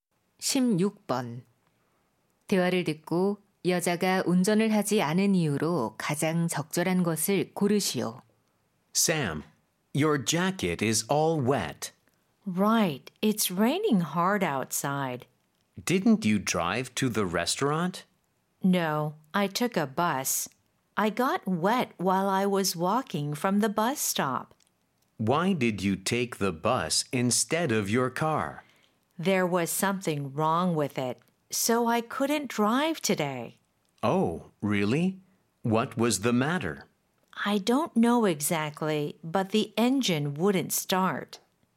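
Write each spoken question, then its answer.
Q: 대화를 듣고 여자가 운전을 하지 않은 이유로 가장 적절한 것을 고르시오.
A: 차에 문제가 있어서 (시동이 안 걸림)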